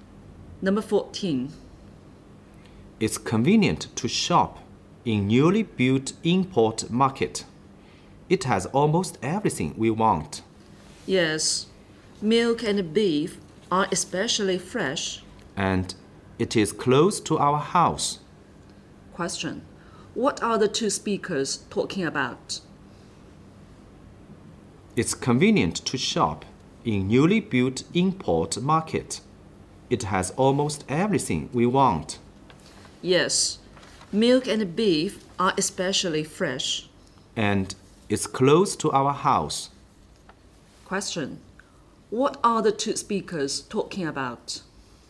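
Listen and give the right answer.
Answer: The newly built import market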